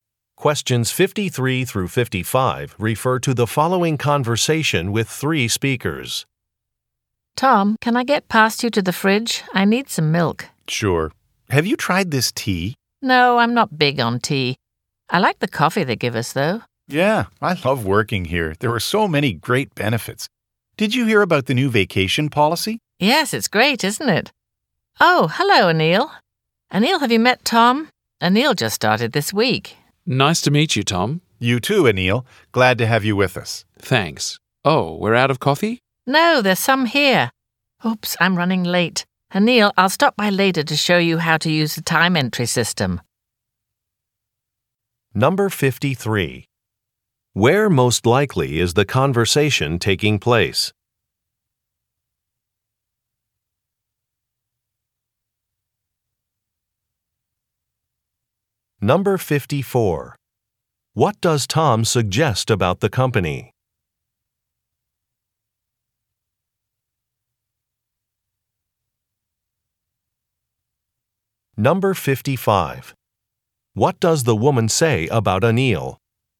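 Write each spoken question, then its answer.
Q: Where most likely is the conversation taking place?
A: In an office kitchen

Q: What does Tom suggest about the company?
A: It offers many great benefits

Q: What does the woman say about Anil?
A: He just started this week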